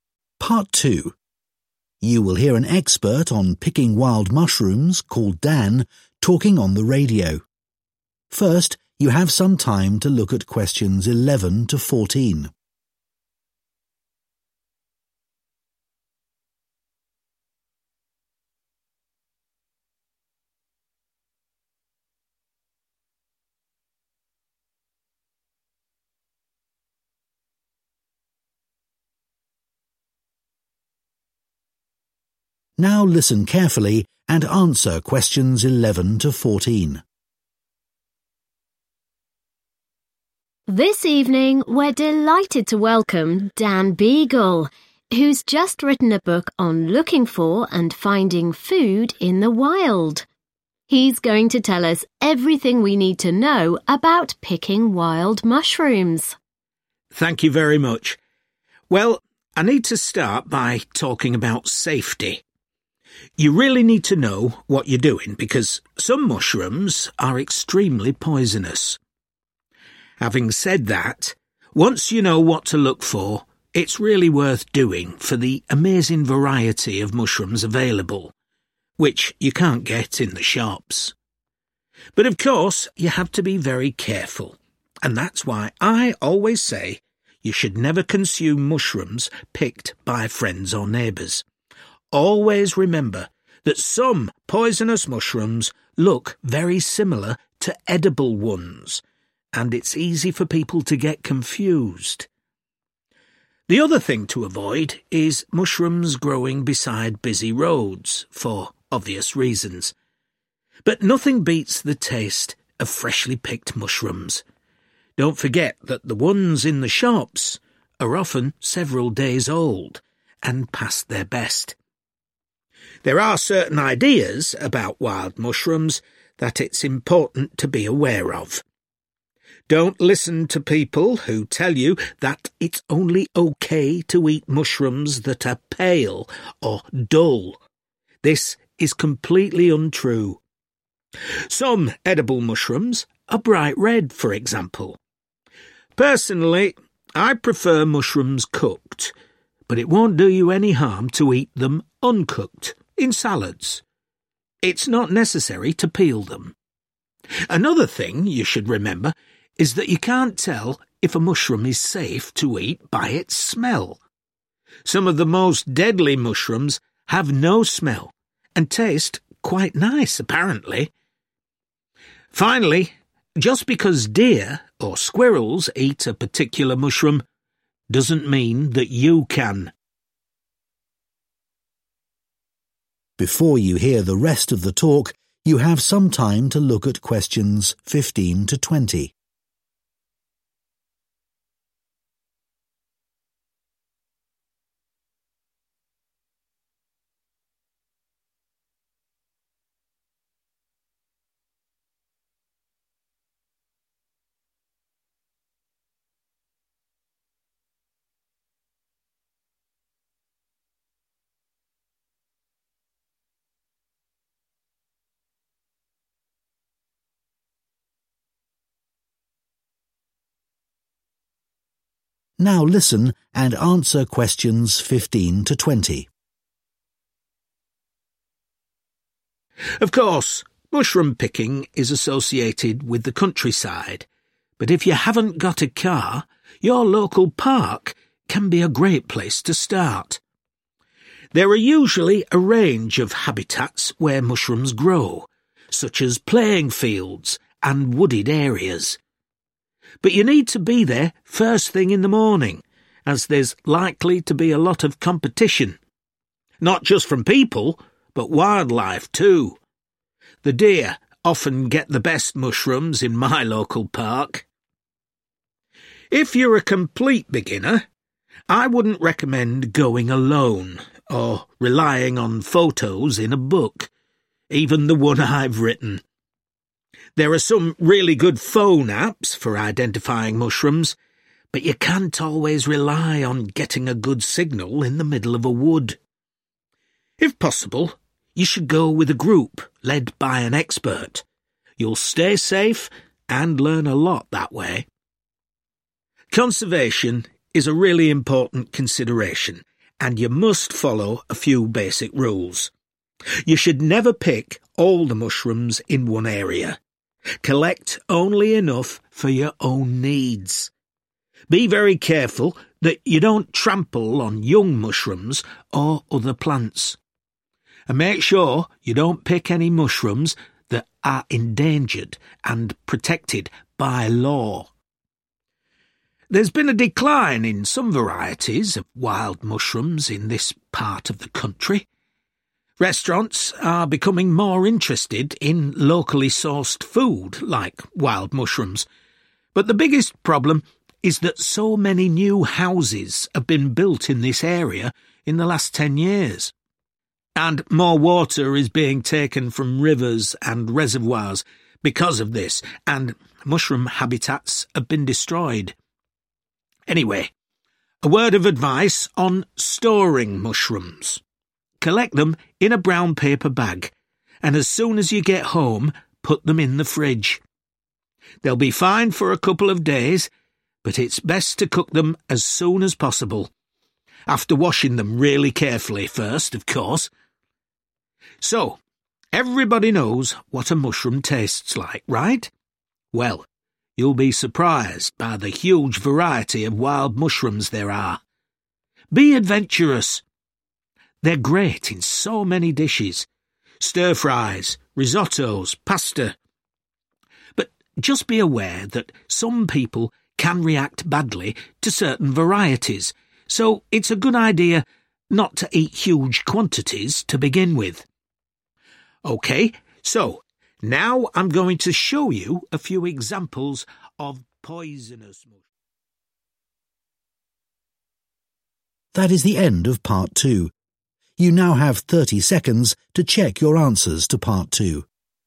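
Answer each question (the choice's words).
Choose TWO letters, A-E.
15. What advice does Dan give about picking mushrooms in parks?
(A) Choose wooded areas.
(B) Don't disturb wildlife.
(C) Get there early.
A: Get there early.

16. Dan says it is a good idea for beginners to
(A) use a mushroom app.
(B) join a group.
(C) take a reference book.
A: join a group.

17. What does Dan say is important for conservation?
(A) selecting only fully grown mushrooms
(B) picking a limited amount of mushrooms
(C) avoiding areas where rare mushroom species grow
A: picking a limited amount of mushrooms

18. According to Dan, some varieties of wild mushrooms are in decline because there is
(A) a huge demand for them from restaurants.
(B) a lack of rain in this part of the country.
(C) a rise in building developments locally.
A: a rise in building developments locally.

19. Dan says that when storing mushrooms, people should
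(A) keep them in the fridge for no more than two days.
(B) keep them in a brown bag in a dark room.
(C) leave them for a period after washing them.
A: keep them in the fridge for no more than two days.

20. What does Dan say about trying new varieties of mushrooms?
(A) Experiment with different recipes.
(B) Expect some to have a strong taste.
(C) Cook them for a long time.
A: Experiment with different recipes.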